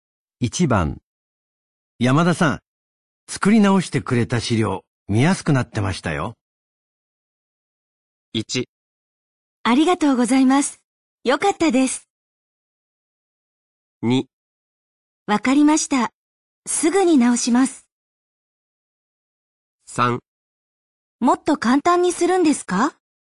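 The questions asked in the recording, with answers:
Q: 山田さん、作り直してくれた資料見やすくなってましたよ。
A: 1: ありがとうございます。よかったです。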